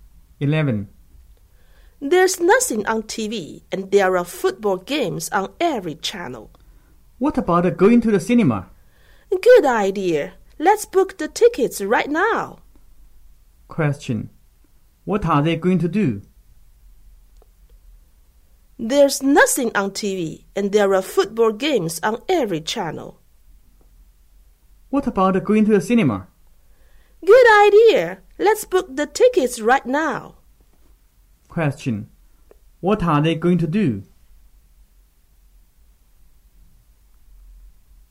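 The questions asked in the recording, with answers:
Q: What are they going to do?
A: Go to the cinema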